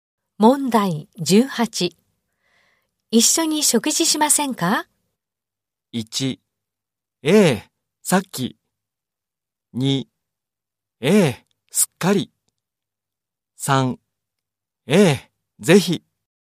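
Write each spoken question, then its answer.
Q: 一緒に食事しませんか?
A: 3: ええ、ぜひ。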